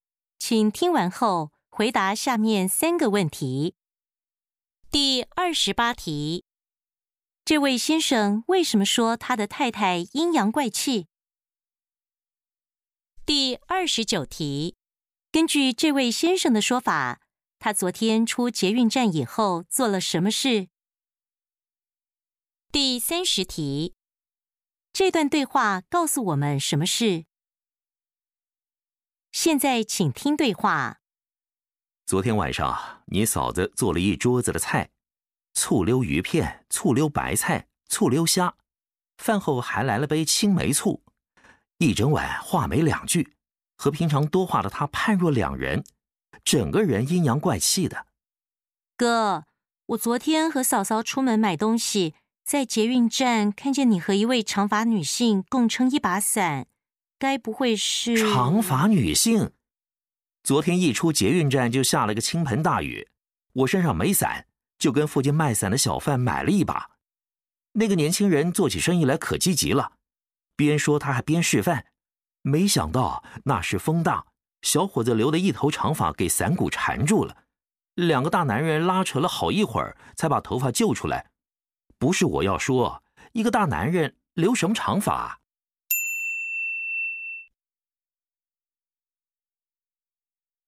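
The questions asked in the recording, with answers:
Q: 这位先生为什么说他的太太阴阳怪气?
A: 因为太太看见他和一位长发的人共撑一把伞,以为是女人,吃醋了

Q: 根据这位先生的说法,他昨天出捷运站以后做了什么事?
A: 下大雨,他跟附近卖伞的小贩买了一把伞

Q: 这段对话告诉我们什么事?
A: 太太误会了,那位"长发女性"其实是留长发的男性卖伞小贩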